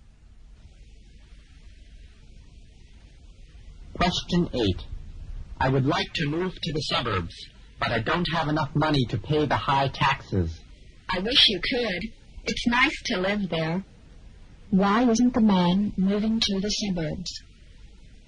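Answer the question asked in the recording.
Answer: He doesn't have enough money to pay the high taxes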